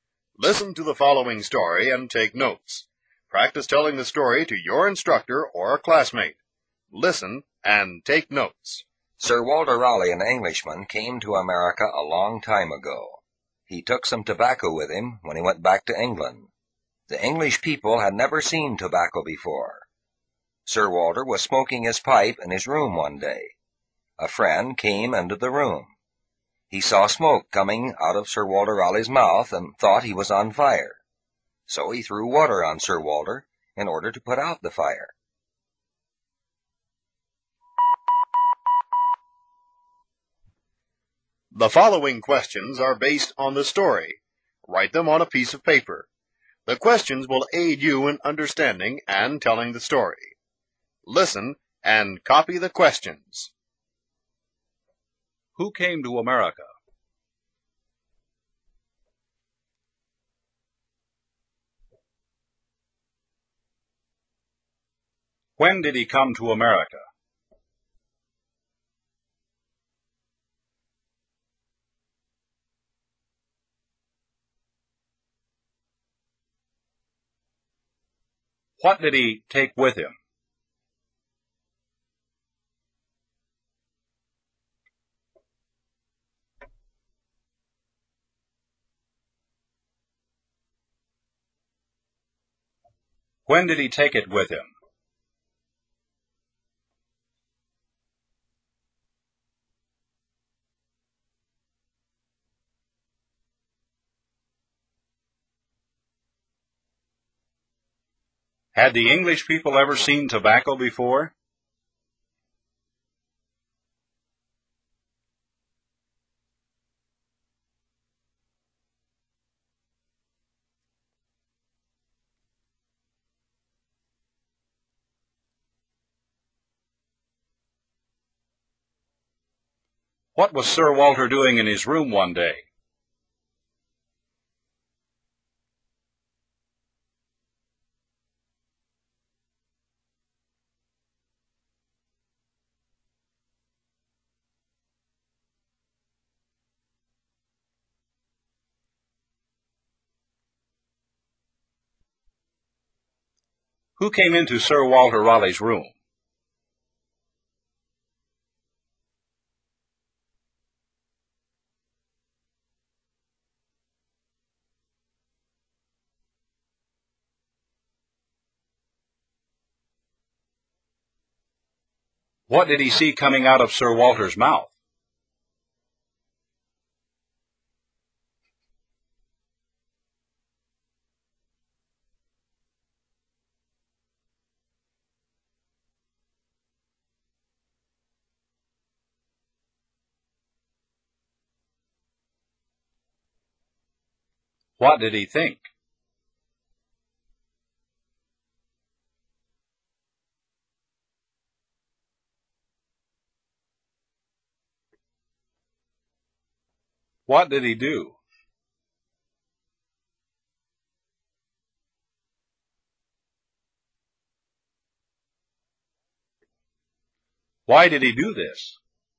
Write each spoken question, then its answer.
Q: Who came to America?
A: Sir Walter Raleigh came to America.

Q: When did he come to America?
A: He came to America a long time ago.

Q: What did he take with him?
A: He took some tobacco with him.

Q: When did he take it with him?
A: When he went back to England.

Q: Had the English people ever seen tobacco before?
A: The English people had never seen tobacco before.

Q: What was Sir Walter doing in his room one day?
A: Sir Walter was smoking his pipe in his room one day.

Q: Who came into Sir Walter Raleigh's room?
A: A friend came into the room.